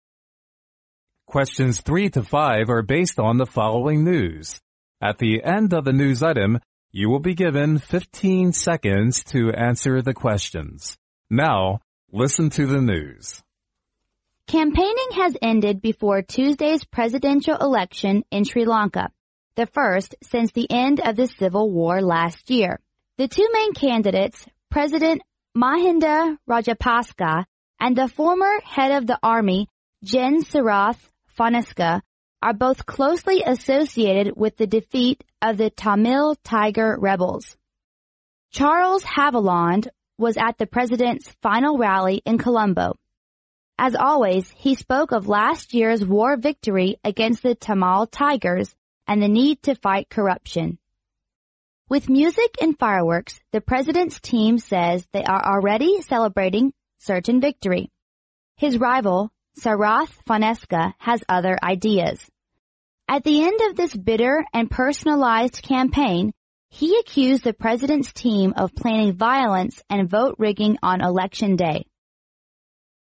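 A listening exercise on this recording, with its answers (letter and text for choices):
Now listen to the news.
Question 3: The two main candidates are both closely associated with_____.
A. the Civil War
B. two Tamil Tiger rebels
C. the defeat of the Tamil Tiger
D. the anti-corruption campaign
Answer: C. the defeat of the Tamil Tiger

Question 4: What did Charles Haviland always speak of?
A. Weak suppression of the Tamil Tigers and the urgency to fight corruption.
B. Successful suppression of the Tamil Tigers and the urgency to fight corruption.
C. Successful suppression of the Tamil Tigers and the victory against corruption.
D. Weak suppression of the Tamil Tigers and the victory against corruption.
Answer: B. Successful suppression of the Tamil Tigers and the urgency to fight corruption.

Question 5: Which of the following statements is CORRECT?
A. The presidential campaign was not personalized.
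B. The President's team did control vote on election day.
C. The President's team was accused of planning violence on election day.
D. Sarath's team made violence on purpose on election day.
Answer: C. The President's team was accused of planning violence on election day.

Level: 专业四级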